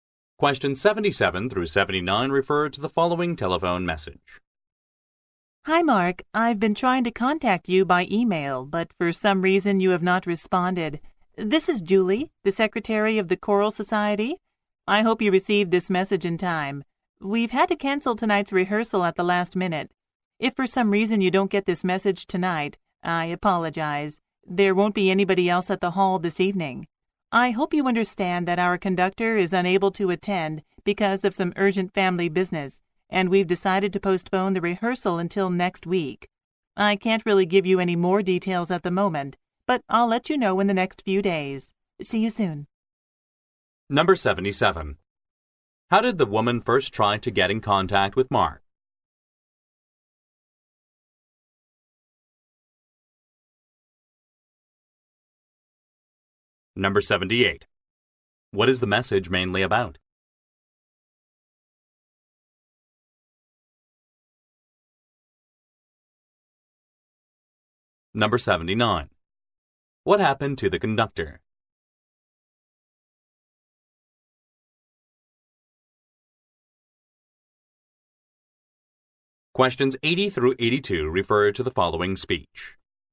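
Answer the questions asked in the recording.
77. By email
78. Tonight's rehearsal has been cancelled
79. He had urgent family business and can't attend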